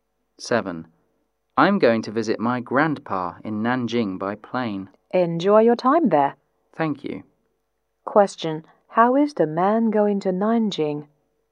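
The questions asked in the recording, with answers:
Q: How is the man going to Nanjing?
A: By plane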